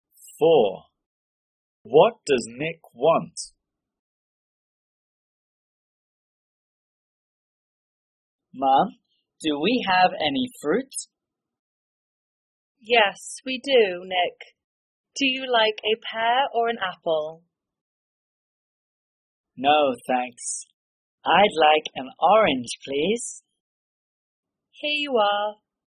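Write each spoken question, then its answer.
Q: What does Nick want?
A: an orange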